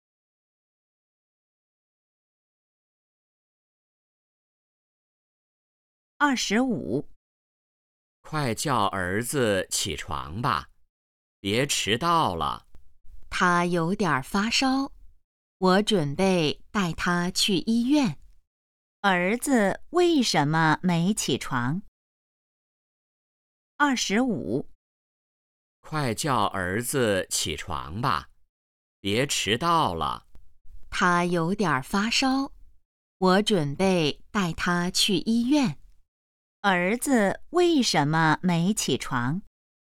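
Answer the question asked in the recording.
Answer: 他有点发烧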